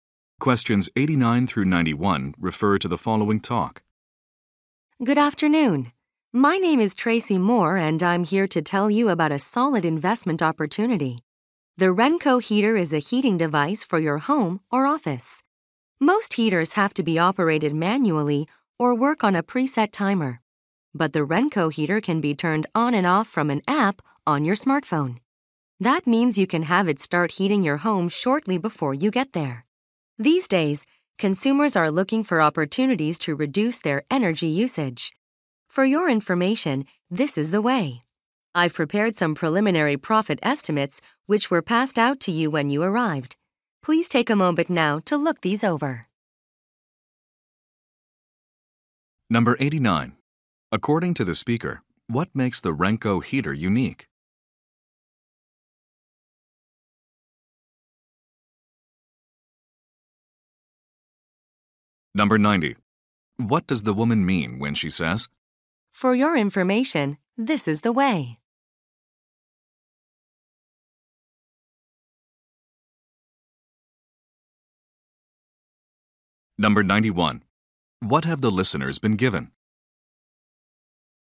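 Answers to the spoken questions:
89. It can be controlled from a smartphone app
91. Preliminary profit estimates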